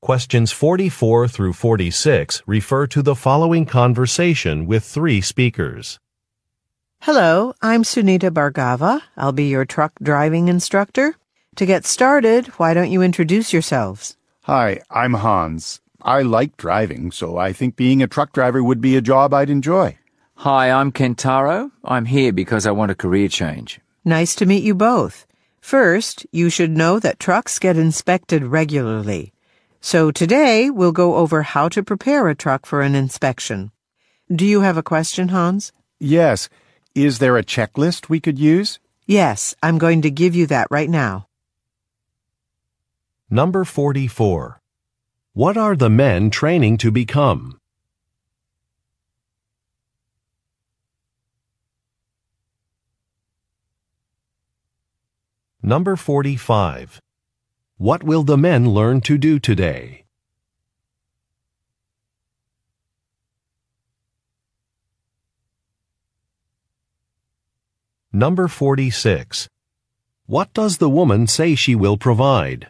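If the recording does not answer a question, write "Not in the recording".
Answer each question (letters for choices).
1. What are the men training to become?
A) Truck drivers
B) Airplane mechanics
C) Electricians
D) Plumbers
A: A

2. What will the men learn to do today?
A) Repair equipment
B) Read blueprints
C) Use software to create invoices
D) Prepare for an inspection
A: D

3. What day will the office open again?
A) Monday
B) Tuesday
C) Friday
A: Not in the recording

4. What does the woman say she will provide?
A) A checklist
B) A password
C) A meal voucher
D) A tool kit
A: A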